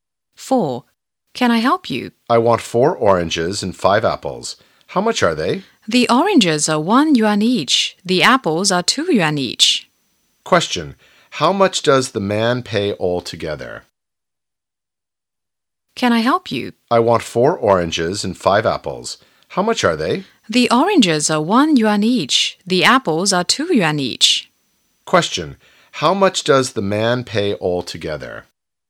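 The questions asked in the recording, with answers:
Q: How much does the man pay altogether?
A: 14 yuan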